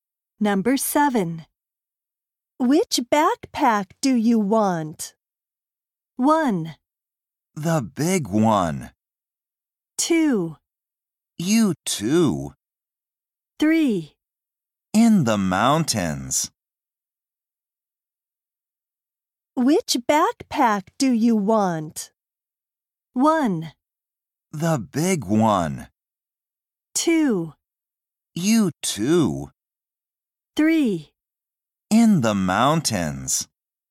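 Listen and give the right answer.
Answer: 1: The big one.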